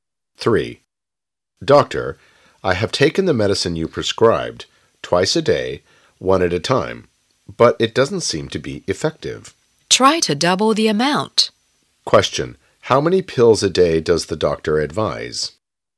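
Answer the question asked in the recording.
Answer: Four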